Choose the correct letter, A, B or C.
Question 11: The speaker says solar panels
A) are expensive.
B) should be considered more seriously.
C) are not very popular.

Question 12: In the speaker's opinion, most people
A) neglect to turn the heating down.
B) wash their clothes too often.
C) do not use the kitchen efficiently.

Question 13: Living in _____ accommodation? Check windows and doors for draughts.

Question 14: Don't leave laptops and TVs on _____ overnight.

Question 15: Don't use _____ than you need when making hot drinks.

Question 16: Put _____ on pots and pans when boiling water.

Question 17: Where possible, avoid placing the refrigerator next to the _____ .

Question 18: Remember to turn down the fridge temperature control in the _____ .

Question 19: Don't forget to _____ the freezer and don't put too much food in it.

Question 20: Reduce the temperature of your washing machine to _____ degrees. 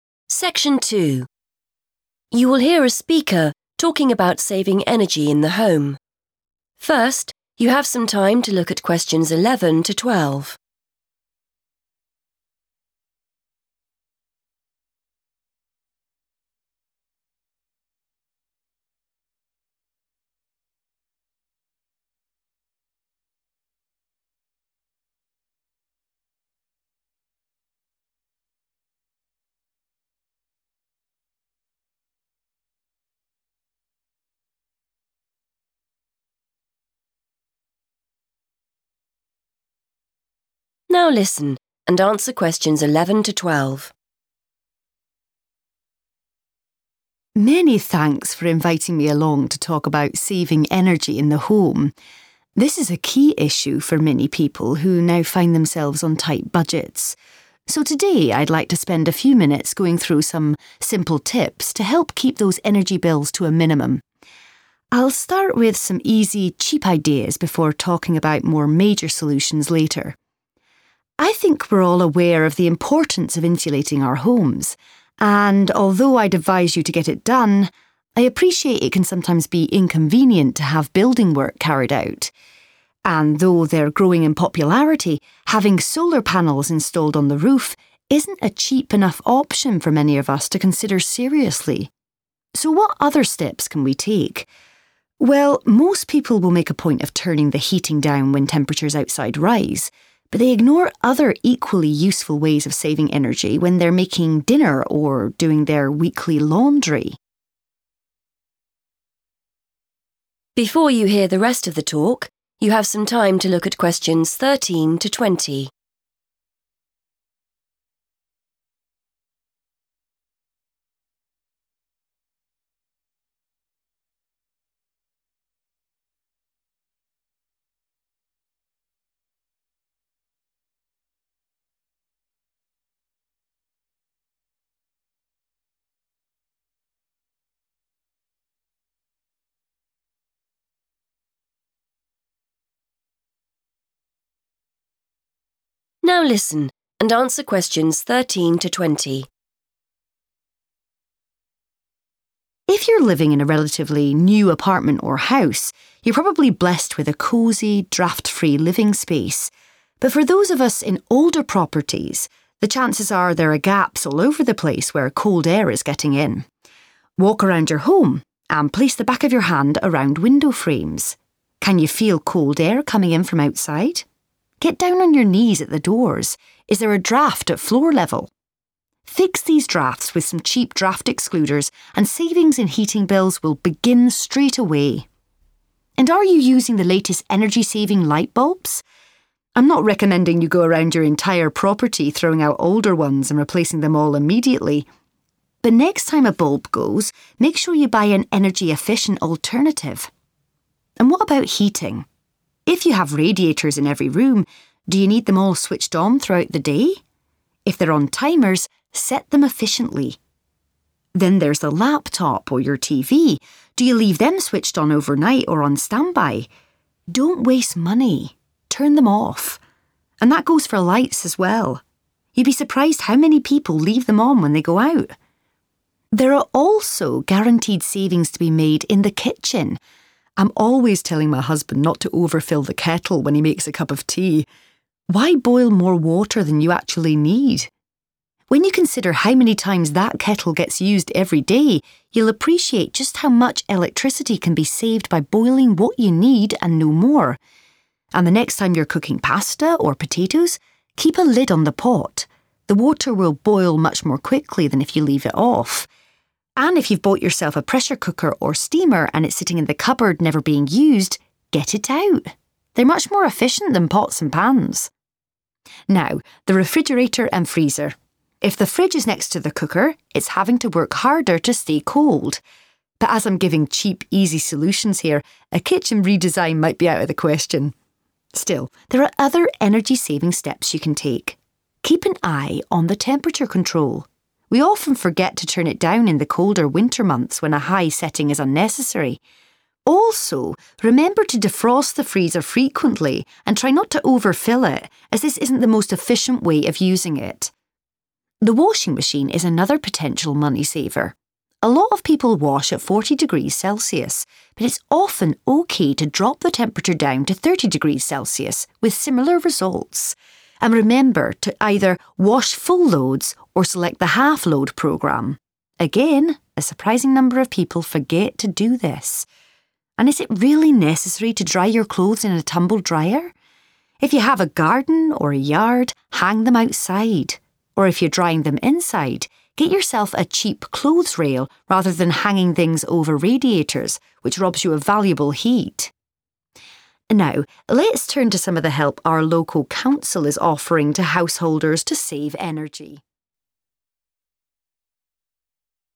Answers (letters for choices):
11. A
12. C
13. older / old
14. standby
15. more water
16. a lid / lids
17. cooker
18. colder winter months / winter months / colder winter / winter
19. defrost
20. thirty / 30

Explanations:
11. The correct answer is A because the speaker mentions that solar panels are not a 'cheap enough option' for many people. In English, if something is not cheap enough, it means it is too expensive for a person to pay for. Although the speaker says solar panels are becoming popular, the high price is the main reason many people do not use them.
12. The correct answer is C because the speaker explains that even though people remember to turn down the heat, they often 'ignore' (do not pay attention to) other ways to save energy, especially when 'making dinner' or cooking. This means they are not being 'efficient' (saving money and energy) in the kitchen. The speaker then lists many kitchen mistakes, such as overfilling the kettle or not using lids on pots.
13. The correct answer is based on the speaker's advice for people living in homes that are not new. The speaker explains that while new buildings are usually warm, 'older properties' (old accommodation) often have small holes or 'gaps' where 'cold air is getting in.' They suggest checking the 'window frames' and 'doors' to find these 'draughts' (moving cold air) to save money on heating.
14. The correct answer is 'standby' because the speaker asks if people leave their electronics in this 'waiting' mode all night long. The speaker suggests that this is a waste of money and tells the listeners to turn these machines off instead to save energy.
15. The correct answer is based on the section of the talk where the speaker gives advice for saving energy in the kitchen. The speaker uses the example of making a cup of tea and suggests that filling the kettle with more water than necessary is a waste of electricity. The speaker's phrase directly matches the sentence structure in the notes.
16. The correct answer is "a lid on" or "lids on" because the speaker explains that covering your cooking pots makes the water boil much faster. This simple action helps save energy while making dinner. Keywords like "cooking," "water," and "boil" in the transcript point to this specific tip.
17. The correct answer is 'cooker' because the speaker mentions that a refrigerator (fridge) has to use more energy to stay cold if it is placed right next to this appliance. To save money and energy, it is better not to have them side-by-side. Keywords to notice are 'next to' and 'cooker'.
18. The correct answer is supported by the speaker's advice regarding the refrigerator. They mention that when the weather gets cold outside, a high cooling setting inside the fridge is not needed, so you should lower it. They specifically name the 'colder winter months' as the time when people often forget to do this. Synonyms like 'turn it down' align with the note's requirement to 'turn down the fridge temperature control'.
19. The correct answer is 'defrost' because the speaker explicitly tells the audience to complete this action to keep the appliance working well. In the transcript, the speaker uses the phrase 'remember to defrost the freezer,' which matches the note 'Don't forget to defrost the freezer' as 'remember' and 'don't forget' have the same meaning. The text also mentions not overfilling it, which matches the second part of the note.
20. The correct answer is 'thirty' or '30' because the speaker mentions that wash results are still good even if you lower the heat. While many people use 40 degrees, the speaker suggests reducing it to save money. Keywords like "drop the temperature" lead directly to the specific number mentioned.

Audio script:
Speaker:
Many thanks for inviting me along to talk about saving energy in the home. This is a key issue for many people who now find themselves on tight budgets. So today I'd like to spend a few minutes going through some simple tips to help keep those energy bills to a minimum. I'll start with some easy, cheap ideas before talking about more major solutions later.
I think we're all aware of the importance of insulating our homes, and although I'd advise you to get it done, I appreciate it can sometimes be inconvenient to have building work carried out. And though they're growing in popularity, having solar panels installed on the roof isn't a cheap enough option for many of us to consider seriously. So what other steps can we take? Well, most people will make a point of turning the heating down when temperatures outside rise but they ignore other equally useful ways of saving energy when they're making dinner or doing their weekly laundry.
If you're living in a relatively new apartment or house, you're probably blessed with a cosy, draught-free living space. But for those of us in older properties, the chances are there are gaps all over the place where cold air is getting in. Walk around your home and place the back of your hand around window frames. Can you feel cold air coming in from outside? Get down on your knees at the doors. Is there a draught at floor level? Fix these draughts with some cheap draught excluders and savings in heating bills will begin straight away.
And are you using the latest energy-saving light bulbs? I'm not recommending you go around your entire property throwing out older ones and replacing them all immediately. But next time a bulb goes, make sure you buy an energy-efficient alternative. And what about heating? If you have radiators in every room, do you need them all switched on throughout the day? If they're on timers, set them efficiently. Then there's the laptop or your TV. Do you leave them switched on overnight or on standby? Don't waste money, turn them off. And that goes for lights as well. You'd be surprised how many people leave them on when they go out.
There are also guaranteed savings to be made in the kitchen. I'm always telling my husband not to overfill the kettle when he makes a cup of tea. Why boil more water than you actually need? When you consider how many times that kettle gets used every day, you'll appreciate just how much electricity can be saved by boiling what you need and no more. And the next time you're cooking pasta or potatoes, keep a lid on the pot. The water will boil much more quickly than if you leave it off. And if you've bought yourself a pressure cooker or steamer and it's sitting in the cupboard never being used, get it out - they're much more efficient than pots and pans.
Now, the refrigerator and freezer. If the fridge is next to the cooker, it's having to work harder to stay cold. But as I'm giving cheap, easy solutions here, a kitchen redesign might be out of the question. Still, there are other energy-saving steps you can take. Keep an eye on the temperature control. We often forget to turn it down in the colder winter months when a high setting is unnecessary. Also, remember to defrost the freezer frequently and try not to overfill it as this isn't the most efficient way of using it.
The washing machine is another potential money saver. A lot of people wash at 40°C but it's often OK to drop the temperature down to 30°C, with similar results. And remember to either wash full loads or select the half-load programme; again, a surprising number of people forget to do this. And is it really necessary to dry your clothes in a tumble drier? If you have a garden or a yard, hang them outside. Or if you're drying them inside, get yourself a cheap clothes rail rather than hanging things over radiators, which robs you of valuable heat.
Now let's turn to some of the help our local council is offering to householders to save energy ...